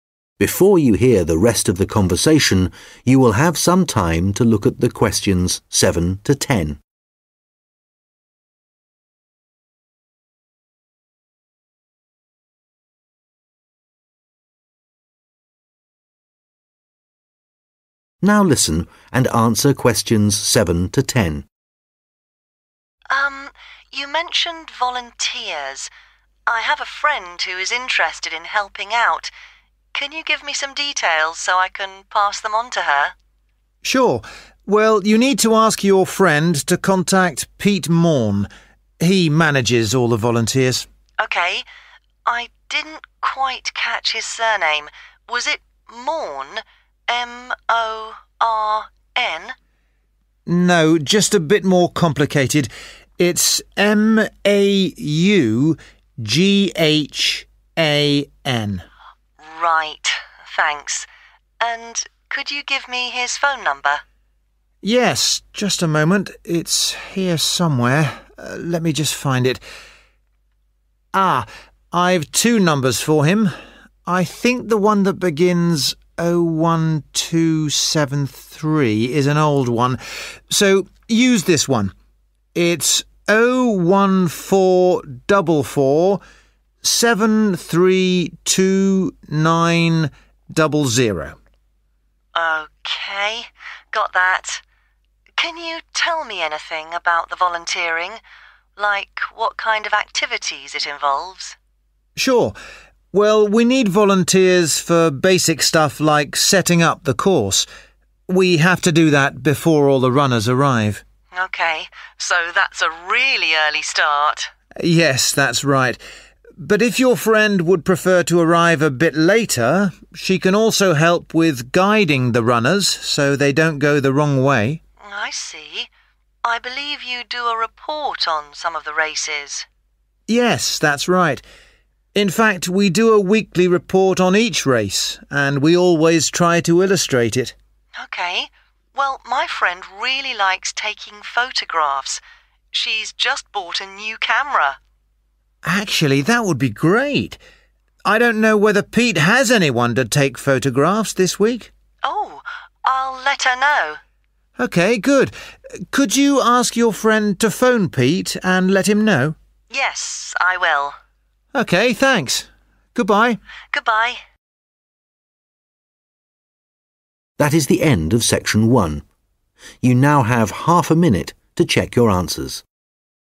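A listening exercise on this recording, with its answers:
Questions 7-10 Complete the notes below. Write NO MORE THAN TWO WORDS AND/OR A NUMBER for each answer.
Volunteering Contact name: Pete 7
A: Maughan

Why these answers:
Sure – well you need to ask your friend to contact Pete Maughan. He manages all the volunteers (Chắc chắn rồi – bạn cần bảo bạn mình liên hệ với Pete Maughan. Ông ấy quản lý tất cả các tình nguyện viên)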